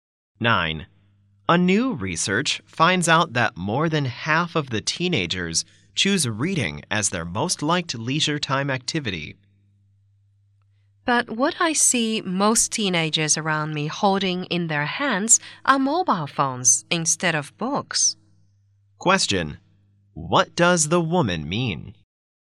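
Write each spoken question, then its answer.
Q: What does the woman mean?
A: She doubts the research finding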